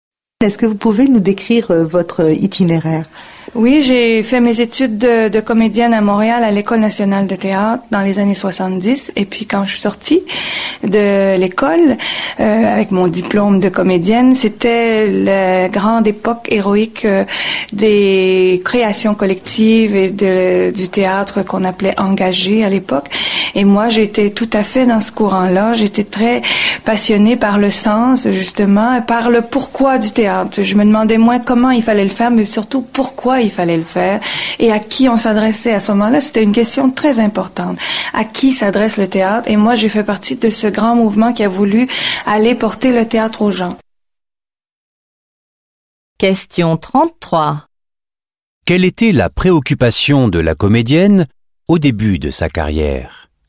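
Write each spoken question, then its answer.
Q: Quelle était la préoccupation de la comédienne au début de sa carrière?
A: Le sens du théâtre: pourquoi le faire et à qui il s'adresse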